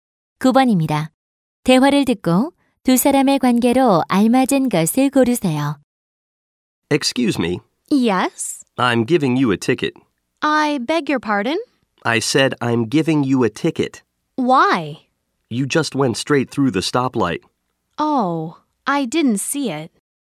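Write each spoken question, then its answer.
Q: 대화를 듣고 두 사람의 관계로 알맞은 것을 고르세요.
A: 경찰관과 운전자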